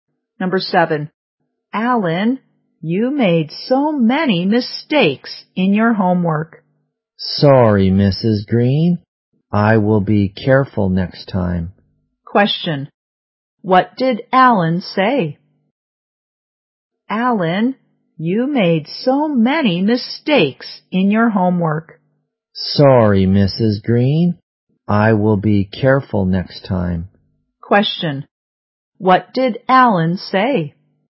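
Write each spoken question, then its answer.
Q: Question. What did Alan say?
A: Sorry, he will be careful next time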